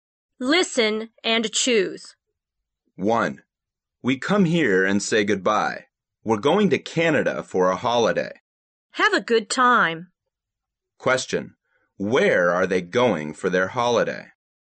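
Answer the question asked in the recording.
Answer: Canada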